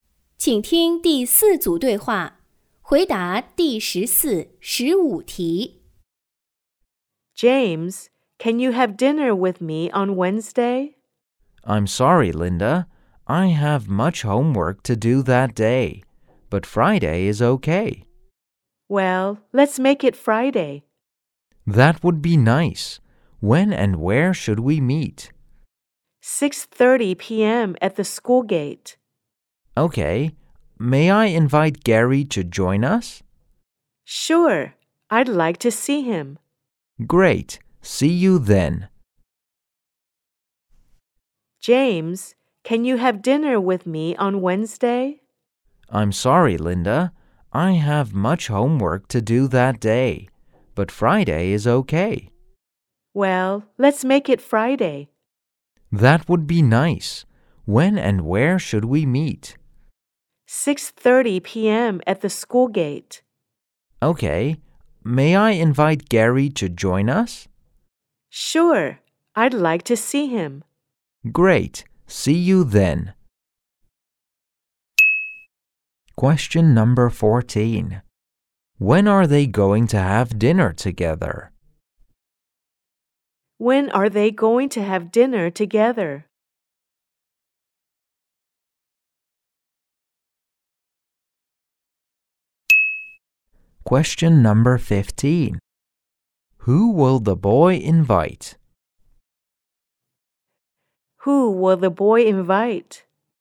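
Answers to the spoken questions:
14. On Friday at 6:30 p.m.
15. Gary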